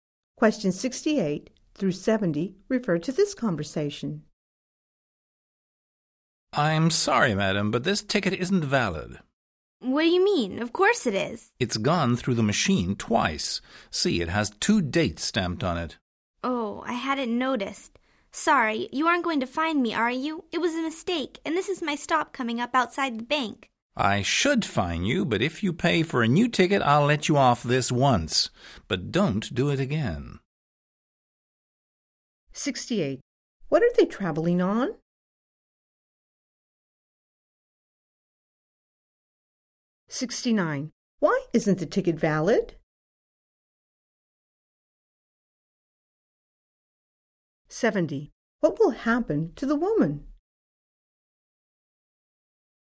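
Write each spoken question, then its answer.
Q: Why isn't the ticket valid?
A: It has been used twice

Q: What will happen to the woman?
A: She must buy a new ticket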